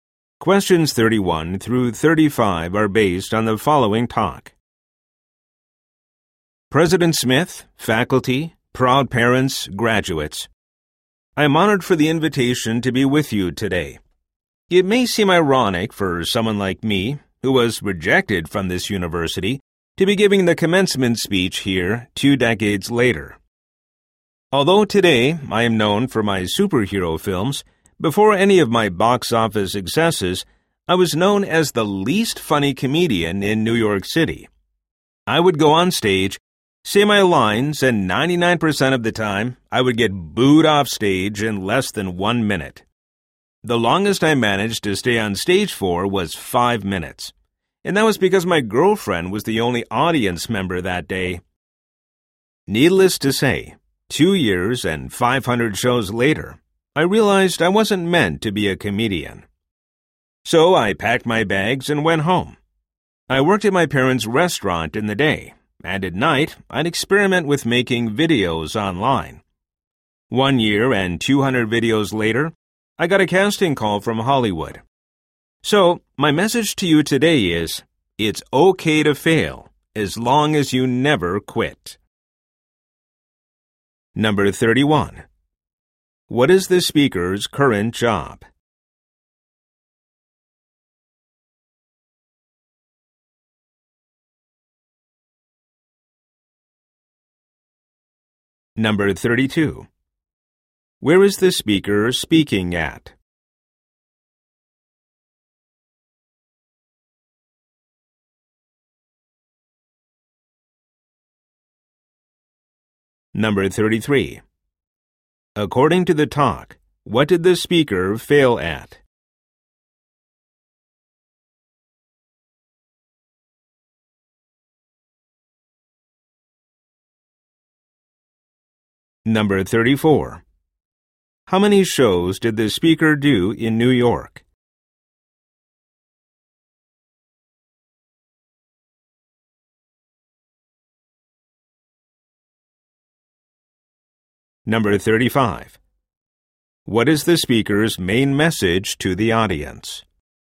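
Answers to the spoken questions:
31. Making superhero films
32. A university commencement
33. Being a comedian
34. 500
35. It's okay to fail as long as you never quit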